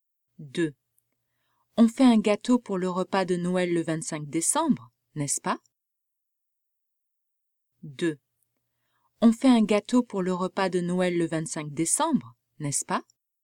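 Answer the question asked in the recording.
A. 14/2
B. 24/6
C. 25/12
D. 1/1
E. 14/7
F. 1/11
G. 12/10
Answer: C. 25/12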